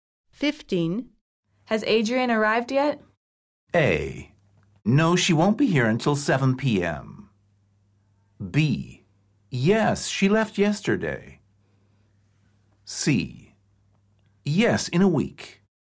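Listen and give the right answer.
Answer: A: No, she won't be here until 7 p.m.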